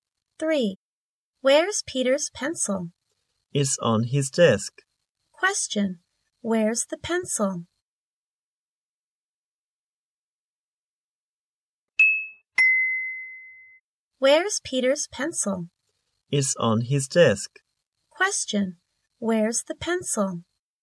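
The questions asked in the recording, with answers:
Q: Where's the pencil?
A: It's on Peter's desk.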